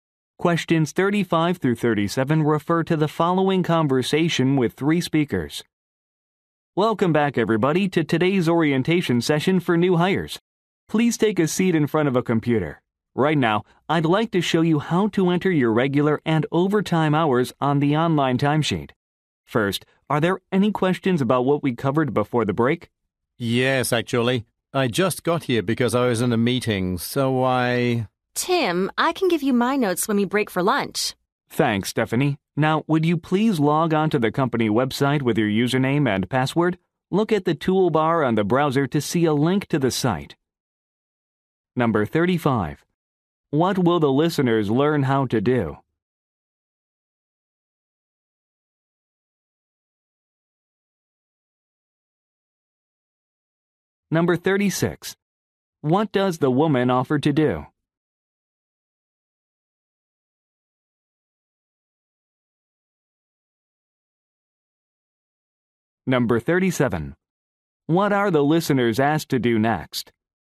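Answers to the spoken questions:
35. Enter their hours on the online timesheet
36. Give Tim her notes
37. Log on to the company website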